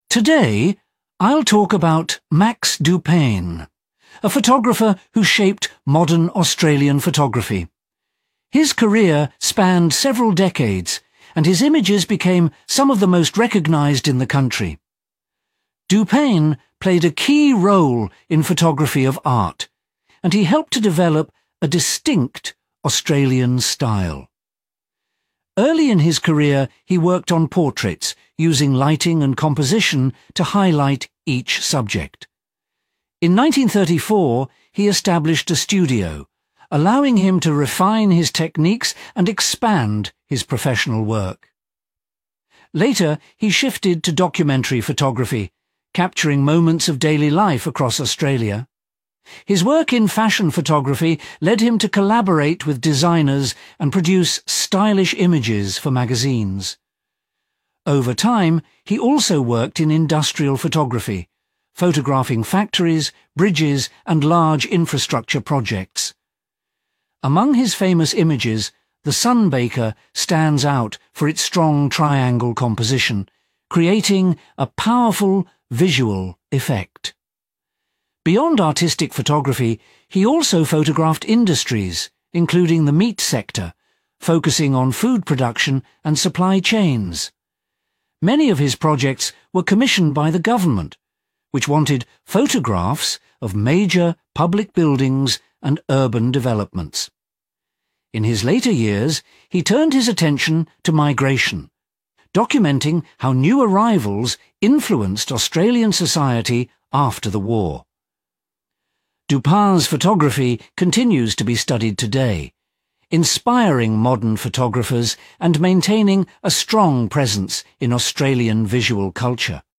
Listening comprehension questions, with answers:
Complete the notes below. Write ONE WORD ONLY for each answer.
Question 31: He made a strong impact on 31 ............... photography in Australia.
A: Art

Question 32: His early work focused on 32 ..............., showing natural expressions and details.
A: Portraits

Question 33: He opened a 33 ............... in 1934 to explore new creative styles.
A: Studio

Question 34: He worked in 34 ............... photography to record daily life in Australia.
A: Documentary

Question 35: He gained recognition for 35 ............... photography, working with designers and magazines.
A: Fashion

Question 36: He took an interest in 36 ............... photography to capture factories and large structures.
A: Industrial

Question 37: The Sunbaker became well known for its strong 37 ............... composition.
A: Triangle

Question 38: He documented Australia's 38 ............... industry, focusing on food production.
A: Meat

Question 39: He completed projects for the 39 ..............., photographing national developments.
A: Government

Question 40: His later work explored 40 ..............., highlighting changes in population.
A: Migration